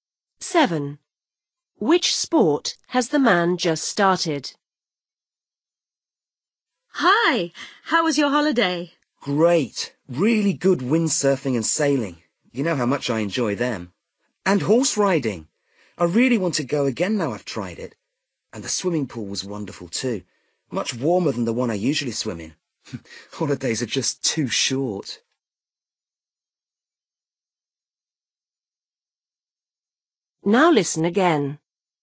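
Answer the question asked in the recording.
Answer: horse riding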